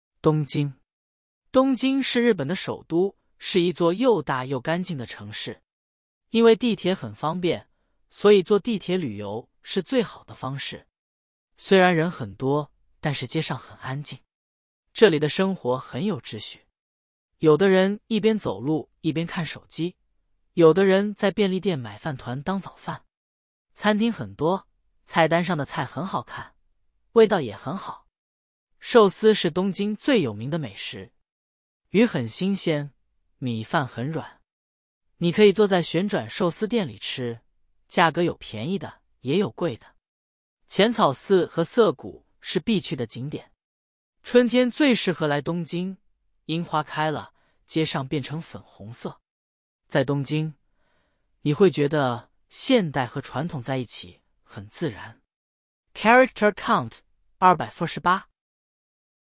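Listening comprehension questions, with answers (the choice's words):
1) 东京是日本的首都。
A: 对

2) 东京的地铁不方便。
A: 错

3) 东京的街上很吵。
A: 错

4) 寿司是东京最有名的美食。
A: 对

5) 旋转寿司店的价格都一样。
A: 错

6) 春天东京的樱花开了。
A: 对

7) 东京是一座什么样的城市?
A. 又小又脏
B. 又大又干净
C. 又旧又乱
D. 又新又吵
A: 又大又干净

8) 在东京,有的人在便利店买什么当早饭?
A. 面包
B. 饭团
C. 面条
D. 饺子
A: 饭团

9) 寿司的鱼怎么样?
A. 很咸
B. 很甜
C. 很新鲜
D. 很辣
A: 很新鲜

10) 浅草寺和涩谷是什么?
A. 餐厅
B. 地铁站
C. 景点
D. 学校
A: 景点

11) 春天东京的街上变成什么颜色?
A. 红色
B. 粉红色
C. 白色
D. 黄色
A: 粉红色

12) 在东京,你觉得现代和传统怎么样?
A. 很矛盾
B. 很自然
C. 很混乱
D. 很无聊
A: 很自然

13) 东京是哪个国家的首都?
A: 日本

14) 为什么坐地铁旅游是最好的方式?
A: 因为地铁很方便

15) 东京的街上虽然人很多,但是怎么样?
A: 很安静

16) 有的人一边走路一边做什么?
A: 看手机

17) 东京最有名的美食是什么?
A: 寿司

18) 春天最适合来东京的原因是什么?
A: 樱花开了,街上变成粉红色

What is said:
东京
东京是日本的首都,是一座又大又干净的城市。因为地铁很方便,所以坐地铁旅游是最好的方式。虽然人很多,但是街上很安静。
这里的生活很有秩序。有的人一边走路一边看手机,有的人在便利店买饭团当早饭。餐厅很多,菜单上的菜很好看,味道也很好。
寿司是东京最有名的美食。鱼很新鲜,米饭很软。你可以坐在旋转寿司店里吃,价格有便宜的也有贵的。
浅草寺和涩谷是必去的景点。春天最适合来东京,樱花开了,街上变成粉红色。在东京,你会觉得现代和传统在一起很自然。
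Character Count: 248

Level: Band 2 – Travel Guide Asia (HSK 3)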